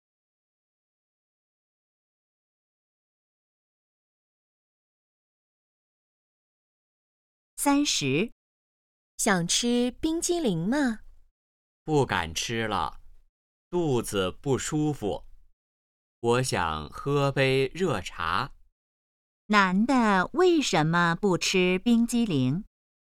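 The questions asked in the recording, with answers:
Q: 男的为什么不吃冰激凌?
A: 肚子不舒服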